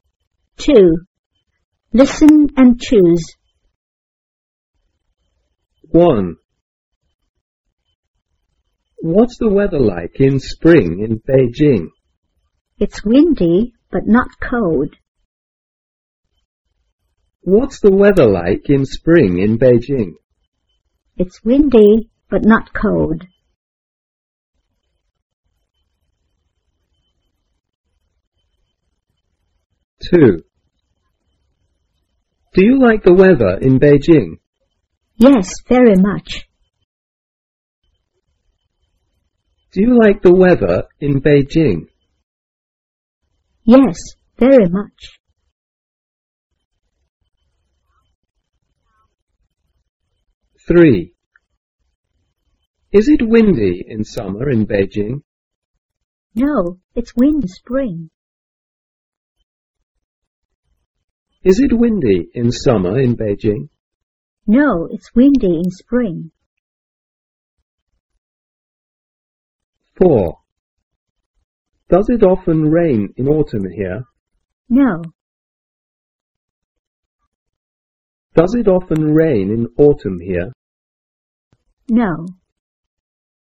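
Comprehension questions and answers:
2.Listen and choose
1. What's the weather like in spring in Beijing?It's windy,but not cold.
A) It's cold.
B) It's windy and cold.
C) It's windy,but not cold.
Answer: It's windy,but not cold.

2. Do you like the weather in Beijing? Yes,very much.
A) I like the weather in Beijing.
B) I don't like the weather in Beijing.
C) I like Beijing,but I don't like its winter.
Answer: I like the weather in Beijing.

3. It's windy in summer in Beijing.No,it's windy in spring.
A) It's windy in spring.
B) It's windy in summer.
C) It's windy in autumn.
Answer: It's windy in spring.

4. Does it often rain in autumn here? No.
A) It often rains in autumn here.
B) It doesn't often rain in autumn here.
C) It doesn't often rain in spring here.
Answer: It doesn't often rain in autumn here.

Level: 三年级

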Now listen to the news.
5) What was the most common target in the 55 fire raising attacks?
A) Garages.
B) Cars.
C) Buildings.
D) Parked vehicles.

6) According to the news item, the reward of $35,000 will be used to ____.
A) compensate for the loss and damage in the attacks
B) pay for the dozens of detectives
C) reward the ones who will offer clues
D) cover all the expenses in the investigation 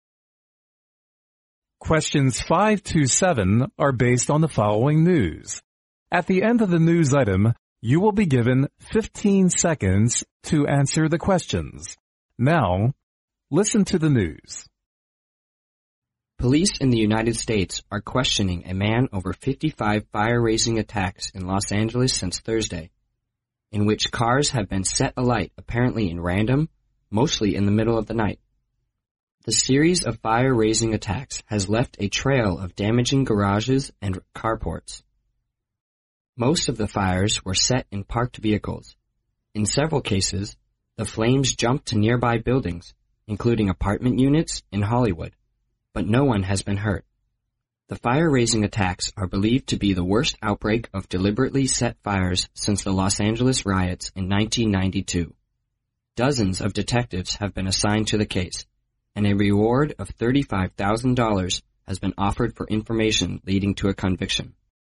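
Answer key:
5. Parked vehicles.
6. reward the ones who will offer clues

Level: 英语四级

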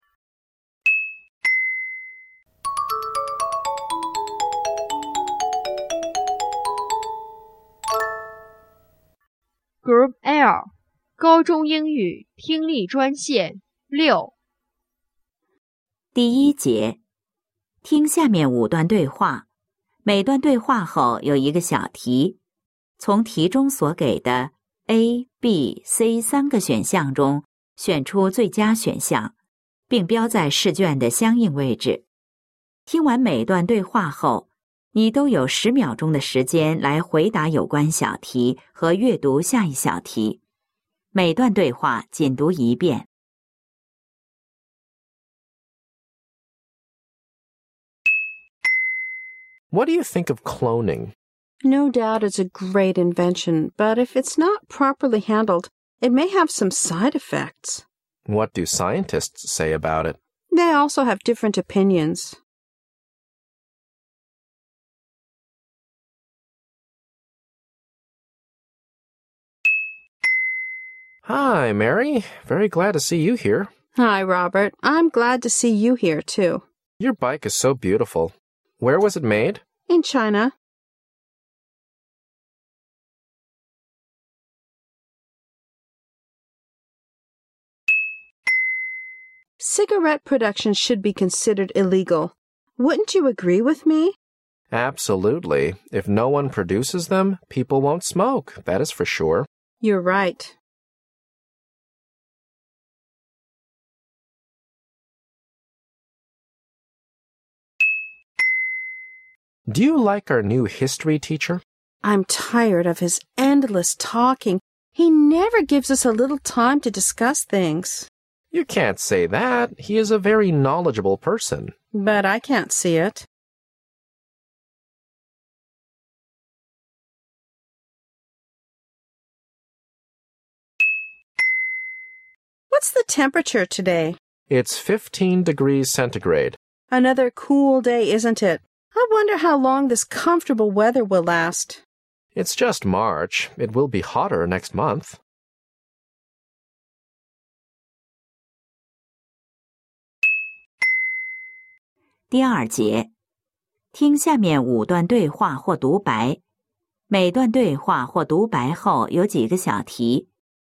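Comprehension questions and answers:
听下面5段对话,每段对话后有一个小题,从题中所给的A、B、C三个选项中选出最佳选项,并标在试卷的相应位置。听完每段对话后,你都有10秒钟的时间来回答有关小题和阅读下一小题。每段对话仅读一遍。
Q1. What does the woman think of cloning?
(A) It has no side effect at all.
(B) It sh ould be strictly forbidden.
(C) It may cause trouble for h umans.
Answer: It may cause trouble for h umans.

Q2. What's the possible relationship between the two speakers?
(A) Friends.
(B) Husband and wife.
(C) Teacher and student.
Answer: Friends.

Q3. What do they hope to do?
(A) Stop cigarette production.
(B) Advise peop le not to smoke.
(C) Stop young people smoking.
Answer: Stop cigarette production.

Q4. What teacher are they talking about?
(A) Their Chinese teacher.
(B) Their history teacher.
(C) Their politics teacher.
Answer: Their history teacher.

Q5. What does the man think the weather will be like in April?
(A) Cool.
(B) Hot.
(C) Windy.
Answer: Hot.

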